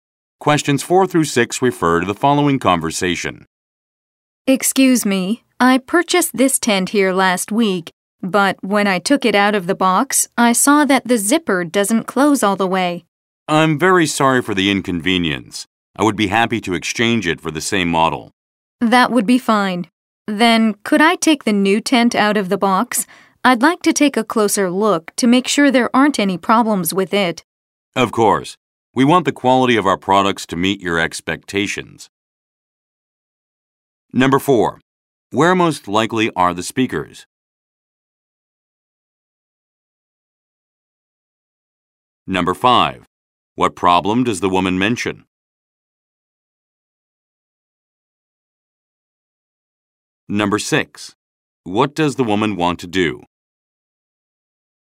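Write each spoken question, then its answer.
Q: Where most likely are the speakers?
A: In a store that sells camping equipment

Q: What problem does the woman mention?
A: The tent's zipper doesn't close all the way

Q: What does the woman want to do?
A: Take the new tent out of the box and check it for problems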